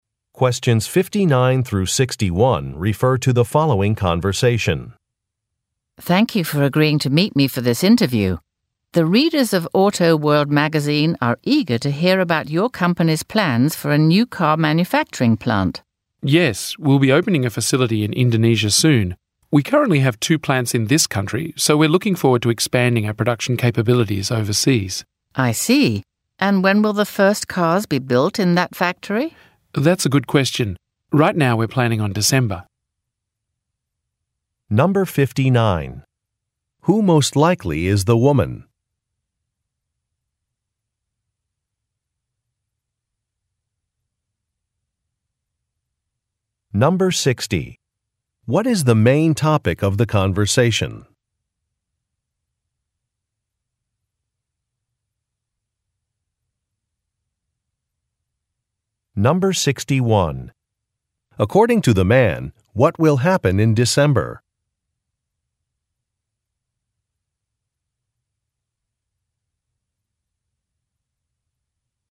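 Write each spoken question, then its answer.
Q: What is the main topic of the conversation?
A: The company's plans for a new car manufacturing plant in Indonesia

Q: According to the man, what will happen in December?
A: The first cars will be built in the new factory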